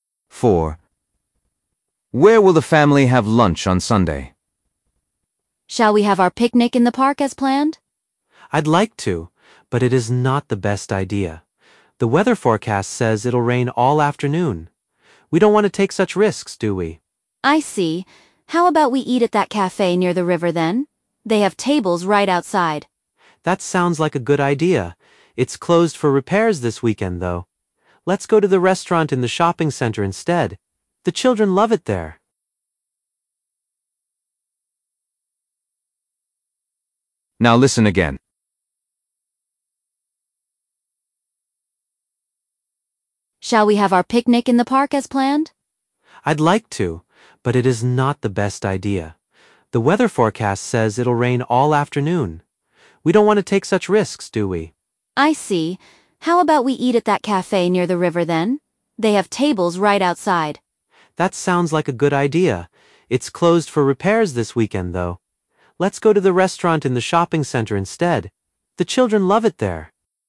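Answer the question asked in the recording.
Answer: at the restaurant in the shopping center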